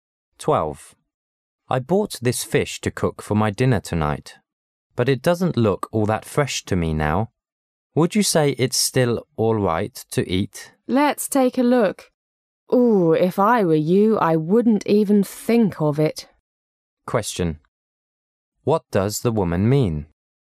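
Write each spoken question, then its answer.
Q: What does the woman mean?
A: The fish shouldn't be eaten

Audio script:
[解析] M: I bought this fish to cook for my dinner tonight, but it doesn't look all that fresh to me now. Would you say it's still all right to eat? W: Let's take a look... Oh, if I were you, I wouldn't even think of it. Q: What does the woman mean?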